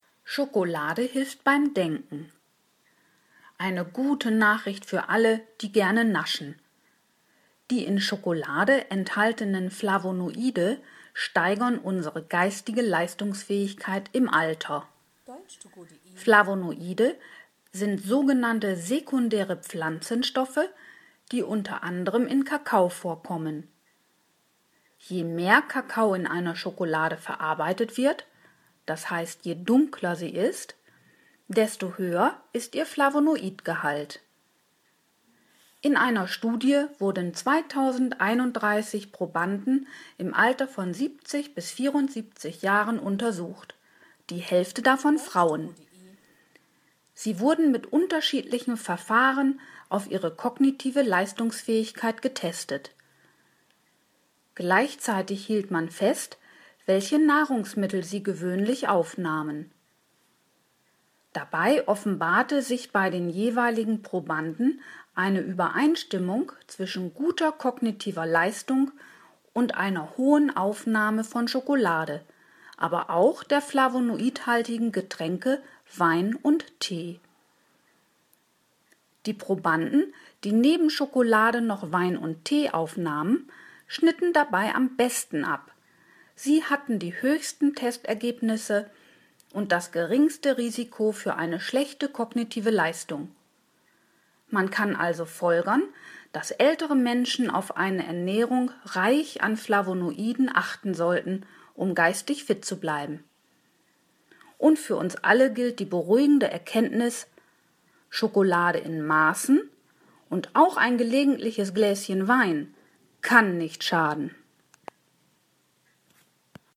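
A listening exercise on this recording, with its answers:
Haben Sie das gehört? Stimmt diese Aussage?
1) Ein Ergebnis der Studie war, dass Flavonoide die geistige Leistungsfähigkeit von Menschen jeden Alters steigern.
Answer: falsch

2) Flavonoide sind sekundäre Pflanzenstoffe.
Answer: richtig

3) Die Farbe der Schokolade hat nichts mit ihrem Flavonoidgehalt zu tun.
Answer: falsch

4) 50 Prozent der untersuchten Probanden waren Frauen.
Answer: richtig

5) Die Untersuchung stellte eine Korrelation zwischen dem Ergebnis kognitiver Tests und der Aufnahme von Flavonoiden durch drei spezielle Nahrungsmittel bei den Probanden fest.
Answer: richtig

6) Die Probanden, die Schokolade aßen, hatten die besten Testergebnisse bezüglich ihrer kognitiven Leistung.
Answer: falsch

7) Eine Schlussfolgerung aus der Untersuchung ist, dass ältere Menschen auf eine Ernährung reich an Flavonoiden achten sollten, um körperlich fit zu sein.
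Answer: falsch

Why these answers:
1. Die Studie untersuchte nur ältere Menschen zwischen 70 und 74 Jahren. Ob auch alle anderen von einer flavonoidreichen Ernährung profitieren, erwähnt der Text nicht.
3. Je dunkler die Schokolade ist, desto mehr flavonoidhaltiger Kakao wurde in ihr verarbeitet.
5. Die Nahrungsmittel sind Schokolade, Wein und Tee.
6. Die besten Testergebnisse erzielten diejenigen Versuchsteilnehmer, die neben Schokolade auch Wein und Tee zu sich nahmen.
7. Es wurde ausschließlich die kognitive Leistungsfähigkeit getestet; man kann also folgern, dass sie geistig fit bleiben.

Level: Hörtexte C (schwer)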